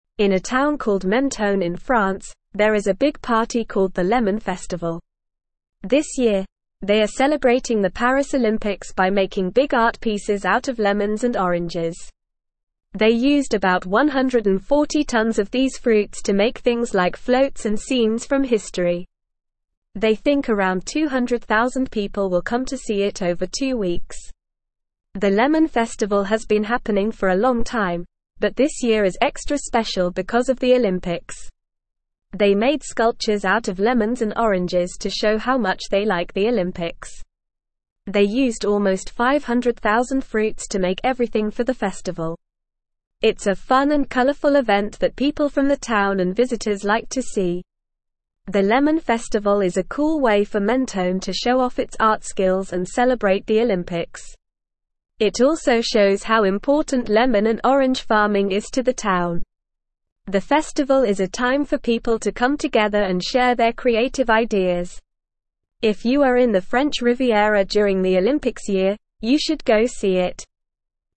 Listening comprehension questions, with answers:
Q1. In a town called Menton in (1)______, there is a big party called the Lemon Festival.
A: France

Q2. This year, they are celebrating the Paris Olympics by (2)______ big art pieces out of (3)______ and oranges.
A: making

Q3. This year, they are celebrating the Paris Olympics by (2)______ big art pieces out of (3)______ and oranges.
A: lemons

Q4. The Lemon Festival has been happening for a (4)______ time, but this year is extra special because of the (5)______.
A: long

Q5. The Lemon Festival has been happening for a (4)______ time, but this year is extra special because of the (5)______.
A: Olympics

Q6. They made (6)______ out of lemons and oranges to show how much they (7)______ the Olympics.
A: sculptures

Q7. They made (6)______ out of lemons and oranges to show how much they (7)______ the Olympics.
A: like

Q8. It's a fun and colorful event that (8)______ from the town and visitors like to see.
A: people

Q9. The Lemon Festival is a (9)______ way for Menton to show off its art skills and celebrate the Olympics.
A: cool

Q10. It also shows how important lemon and (10)______ farming is to the town.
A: orange

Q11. The festival is a time for people to come together and (11)______ their (12)______ ideas.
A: share

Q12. The festival is a time for people to come together and (11)______ their (12)______ ideas.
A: creative

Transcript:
In a town called Menton in France, there is a big party called the Lemon Festival. This year, they are celebrating the Paris Olympics by making big art pieces out of lemons and oranges. They used about 140 tonnes of these fruits to make things like floats and scenes from history. They think around 200,000 people will come to see it over two weeks.
The Lemon Festival has been happening for a long time, but this year is extra special because of the Olympics. They made sculptures out of lemons and oranges to show how much they like the Olympics. They used almost 500,000 fruits to make everything for the festival. It's a fun and colorful event that people from the town and visitors like to see.
The Lemon Festival is a cool way for Menton to show off its art skills and celebrate the Olympics. It also shows how important lemon and orange farming is to the town. The festival is a time for people to come together and share their creative ideas. If you are in the French Riviera during the Olympics year, you should go see it.

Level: Level 2